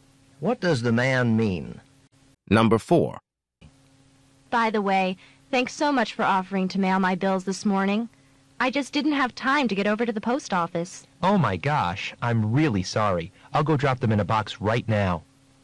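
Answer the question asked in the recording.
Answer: Mail the woman's bills.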